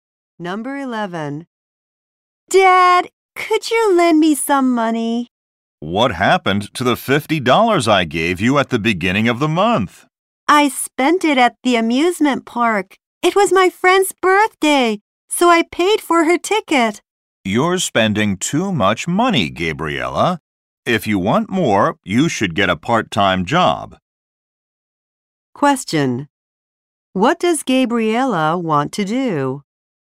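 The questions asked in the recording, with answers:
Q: What does Gabriella want to do?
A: Borrow some money from her dad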